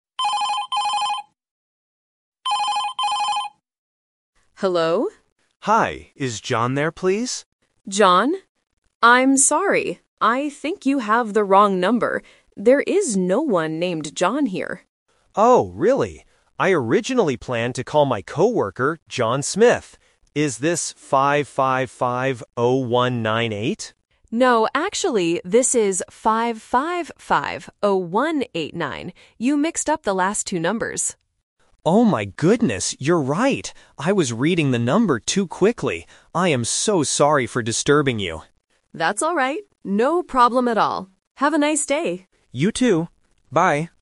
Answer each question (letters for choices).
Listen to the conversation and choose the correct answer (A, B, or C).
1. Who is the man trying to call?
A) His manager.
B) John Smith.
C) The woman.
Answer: B

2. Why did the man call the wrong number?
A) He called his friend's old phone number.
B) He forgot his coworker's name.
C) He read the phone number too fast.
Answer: C

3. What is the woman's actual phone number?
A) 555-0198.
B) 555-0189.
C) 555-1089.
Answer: B

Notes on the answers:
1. The man says, "I originally planned to call my coworker, John Smith." Trap: Option (A) is a trap because he mentions "coworker", not a manager. Option (C) is who he is actually talking to, but not who he is trying to call.
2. The man admits his mistake by saying, "I was reading the number too quickly." Trap: Option (A) is a plausible reason for a wrong number, but it is not mentioned in the audio. Option (B) is wrong because he remembers the name John Smith clearly.
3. The woman says, "No, actually, this is 555-0189." Trap: Option (A) is the classic "Twist/Expectation" trap. 555-0198 is the number the man wanted to call, not the woman's real number. Option (C) is a random distractor with similar numbers.

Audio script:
Woman: Hello?
Man: Hi, is John there, please?
Woman: John? I'm sorry, I think you have the wrong number. There is no one named John here.
Man: Oh, really? I originally planned to call my coworker, John Smith. Is this 555-0198?
Woman: No, actually, this is 555-0189. You mixed up the last two numbers.
Man: Oh my goodness, you're right. I was reading the number too quickly. I am so sorry for disturbing you!
Woman: That's alright. No problem at all. Have a nice day!
Man: You too. Bye.